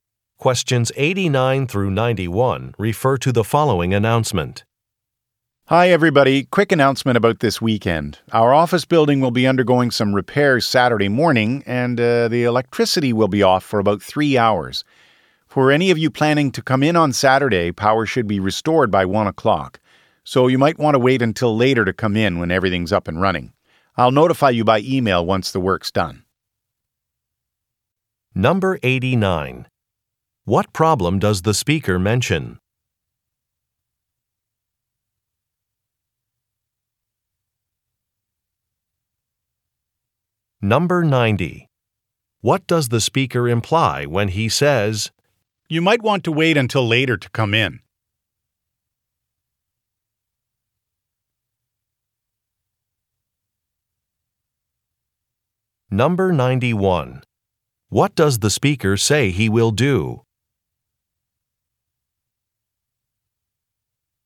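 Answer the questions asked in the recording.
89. The electricity will be off Saturday morning due to repairs
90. There will be no power in the office until 1 o'clock
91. Send an email when the work is done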